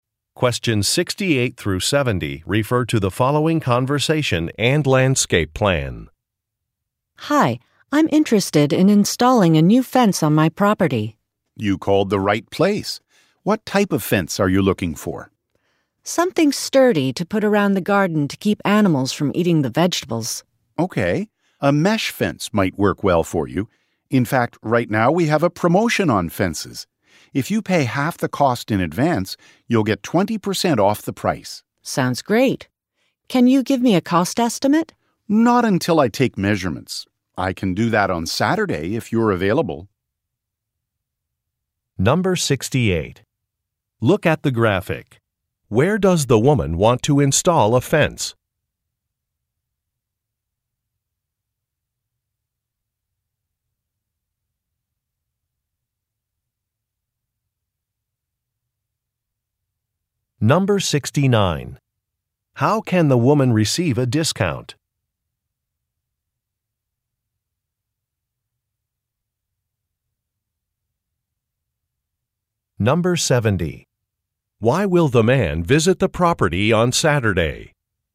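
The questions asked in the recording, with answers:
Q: How can the woman receive a discount?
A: By paying half the cost in advance

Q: Why will the man visit the property on Saturday?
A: To take measurements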